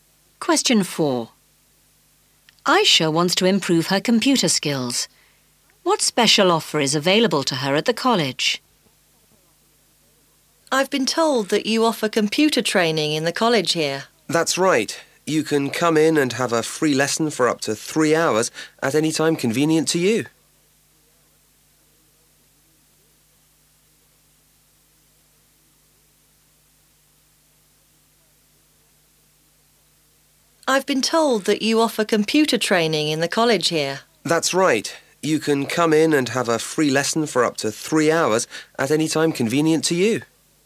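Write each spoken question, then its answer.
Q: What special offer is available to her at the college?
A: A free lesson of up to 3 hours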